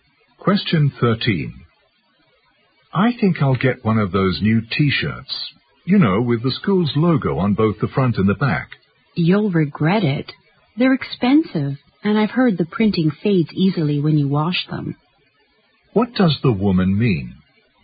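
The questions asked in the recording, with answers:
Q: What does the woman mean?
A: He shouldn't buy the T-shirt, because it's expensive and the printing fades.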